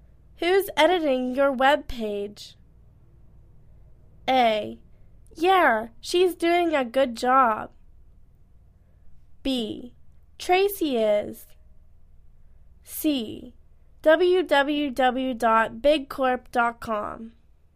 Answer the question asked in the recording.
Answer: Tracy is